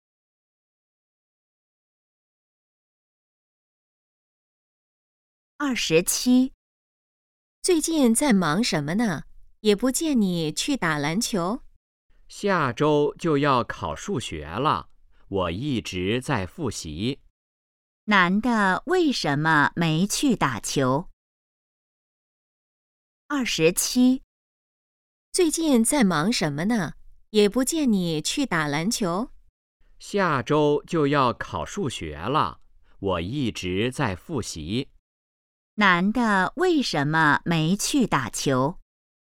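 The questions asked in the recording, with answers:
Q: 男的为什么没去打球?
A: 在复习,准备数学考试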